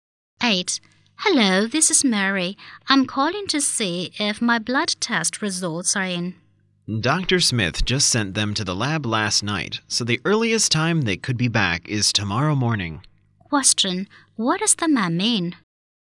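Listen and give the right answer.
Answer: The results won't be ready until tomorrow morning at the earliest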